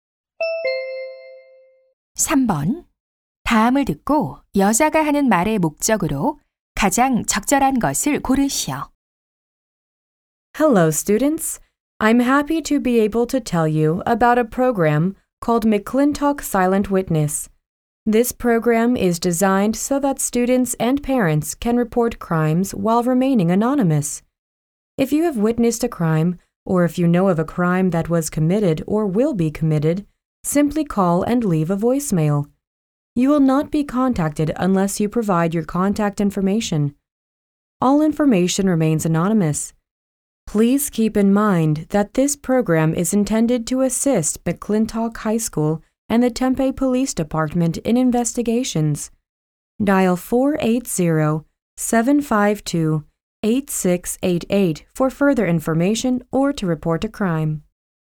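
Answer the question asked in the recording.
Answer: 익명 범죄 신고 프로그램(McClintock Silent Witness)을 소개하려고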